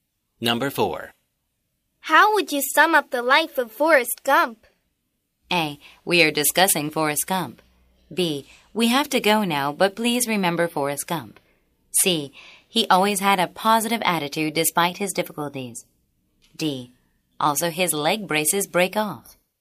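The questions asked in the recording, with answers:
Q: How would you sum up the life of Forrest Gump?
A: C: He always had a positive attitude despite his difficulties.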